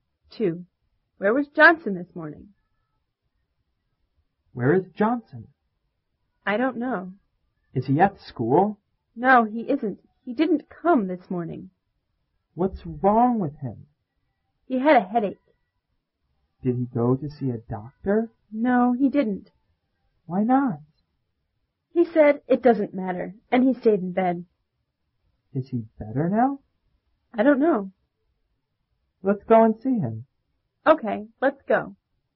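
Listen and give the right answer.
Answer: At home in bed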